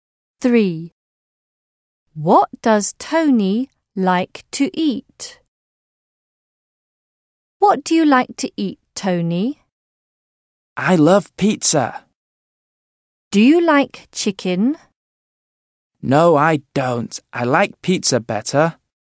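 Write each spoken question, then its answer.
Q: What does Tony like to eat?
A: Pizza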